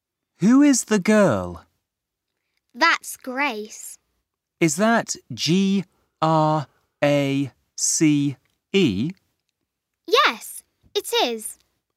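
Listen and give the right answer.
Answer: Grace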